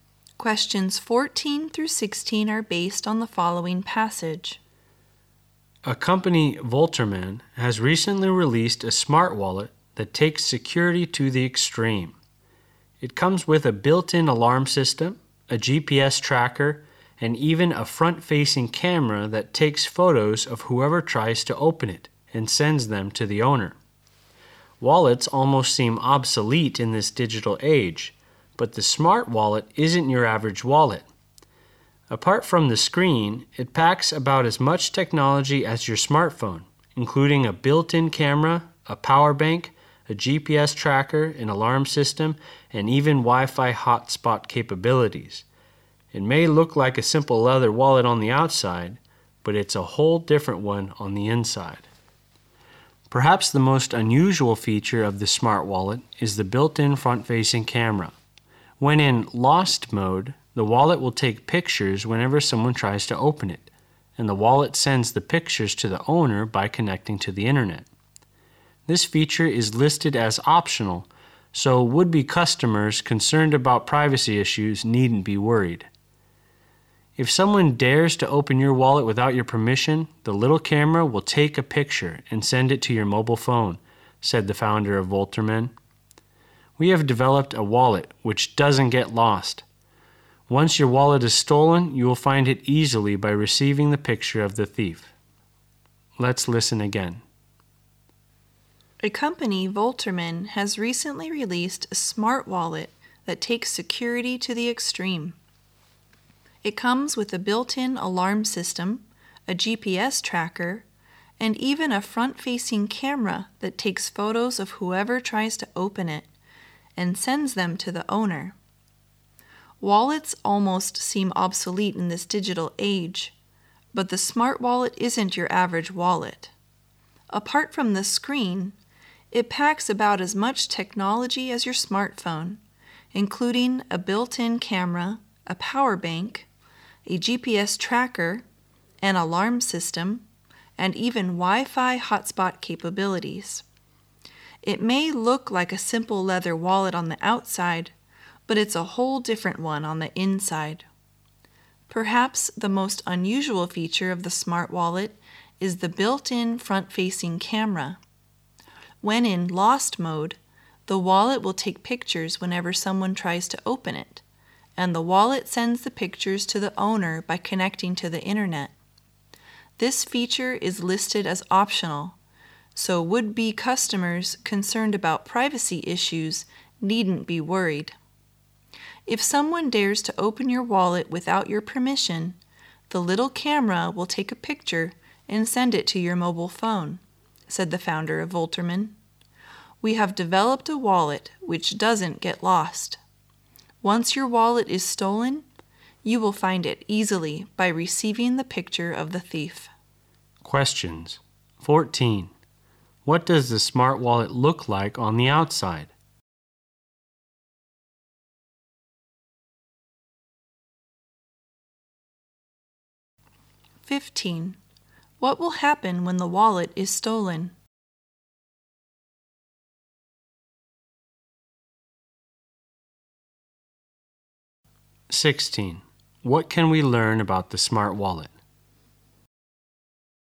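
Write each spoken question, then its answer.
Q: What does the smart wallet look like on the outside?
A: A simple leather wallet

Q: What will happen when the wallet is stolen?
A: Its camera will take a picture of the thief and send it to the owner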